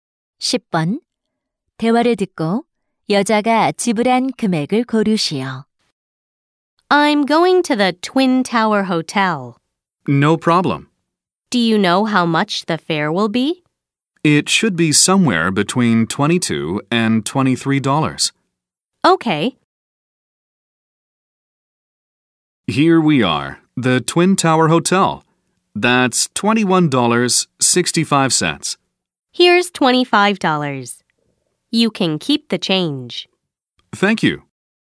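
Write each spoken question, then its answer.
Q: 대화를 듣고 여자가 지불한 금액을 고르시오.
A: 25달러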